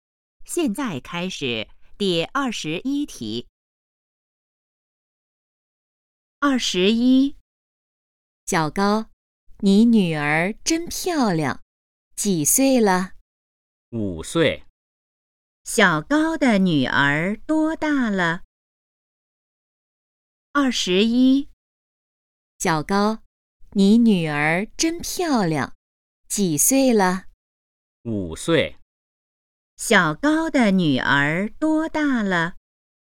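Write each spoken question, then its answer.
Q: 小高的女儿多大了?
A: 五岁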